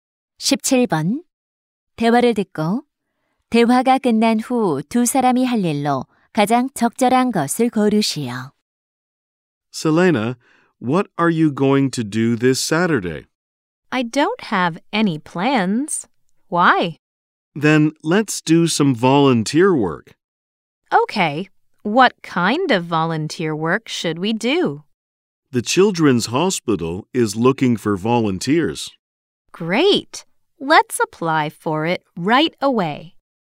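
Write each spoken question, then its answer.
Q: 대화를 듣고 대화가 끝난 후 두 사람이 할 일로 가장 적절한 것을 고르시오.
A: 어린이 병원 자원봉사 신청하기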